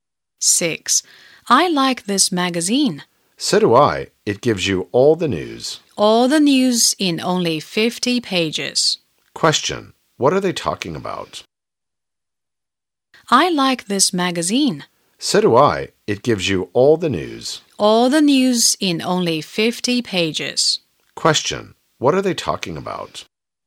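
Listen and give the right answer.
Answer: A magazine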